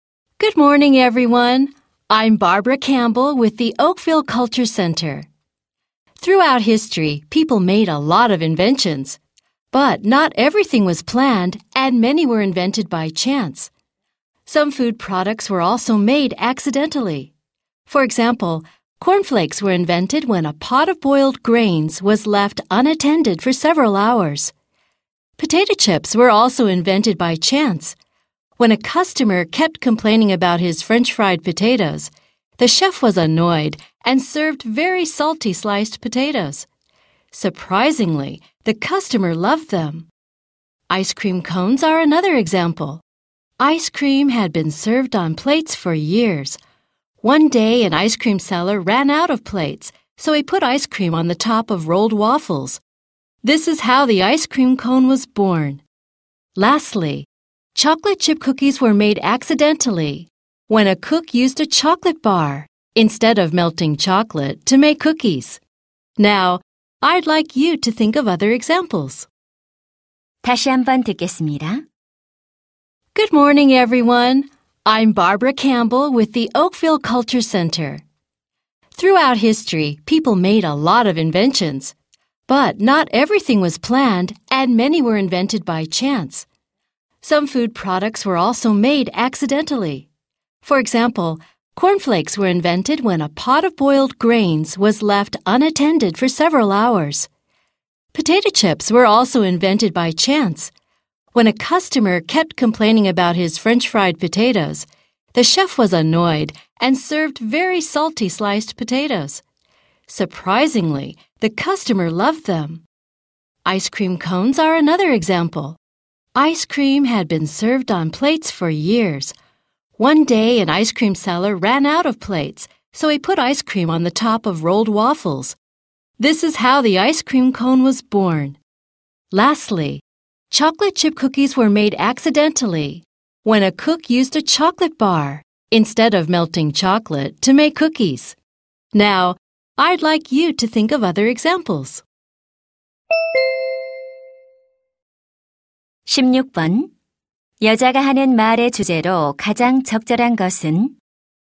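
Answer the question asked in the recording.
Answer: 우연히 발명된 음식들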